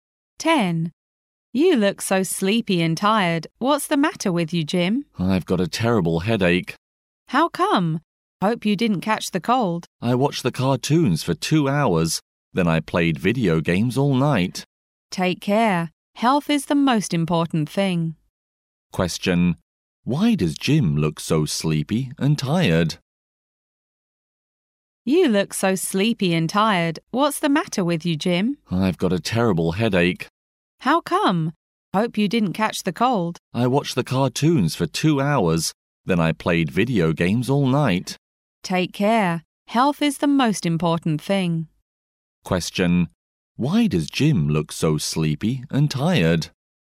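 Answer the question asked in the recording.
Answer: He watched cartoons for 2 hours and played video games all night.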